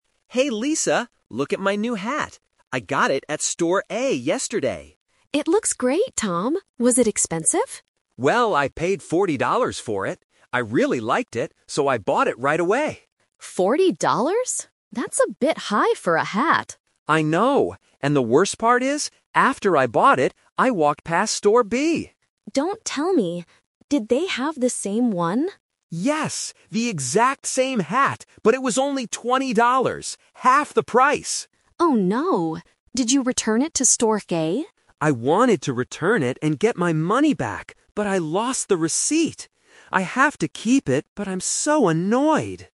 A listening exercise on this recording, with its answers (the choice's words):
Listen to the conversation and choose the correct answer (A, B, or C).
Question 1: How much money did Tom pay for the hat?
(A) Twenty dollars.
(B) Forty dollars.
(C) Sixty dollars.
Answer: Forty dollars.

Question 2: What did Tom find out when he walked past Store B?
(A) They had a much nicer hat.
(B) They had the same hat for less money.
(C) They were selling cheaper shoes.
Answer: They had the same hat for less money.

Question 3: What happens in the end?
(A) He returns the hat to Store A.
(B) He buys another hat at Store B.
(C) He keeps the hat because he lost the receipt.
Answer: He keeps the hat because he lost the receipt.

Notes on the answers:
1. Tom clearly states, "I paid forty dollars for it." Option A is a trap because twenty dollars is the cheaper price he saw later at Store B. Option C is just a plausible number but is never mentioned.
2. Tom says that Store B had "The exact same hat, but it was only twenty dollars" (half the price). Option A is a trap because the hat wasn't nicer, it was exactly the same. Option C is incorrect because they are talking about hats, not shoes.
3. This uses the "Twist" technique. Tom wanted to return the hat to get his money back, but he couldn't because he lost the receipt, so he has to keep it. Option A is the main trap (what he wanted to do, but failed to do). Option B is a plausible guess for a shopping story, but he didn't buy a second hat.

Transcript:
Tom: Hey, Lisa! Look at my new hat. I got it at Store A yesterday.
Lisa: It looks great, Tom! Was it expensive?
Tom: Well, I paid forty dollars for it. I really liked it, so I bought it right away.
Lisa: Forty dollars? That's a bit high for a hat.
Tom: I know! And the worst part is, after I bought it, I walked past Store B.
Lisa: Don't tell me... did they have the same one?
Tom: Yes! The exact same hat, but it was only twenty dollars. Half the price!
Lisa: Oh no! Did you return it to Store A?
Tom: I wanted to return it and get my money back, but I lost the receipt. I have to keep it, but I'm so annoyed!